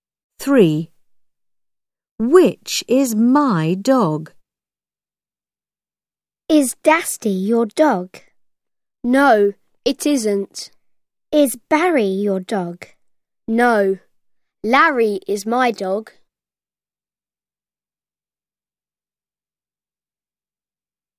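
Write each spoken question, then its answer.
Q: Which is my dog?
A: Larry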